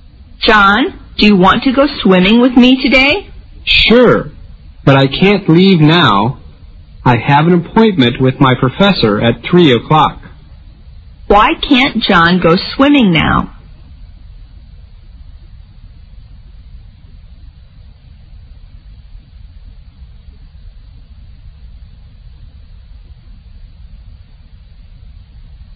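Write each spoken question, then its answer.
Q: Why can't John go swimming now?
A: He has an appointment with his professor at 3 o'clock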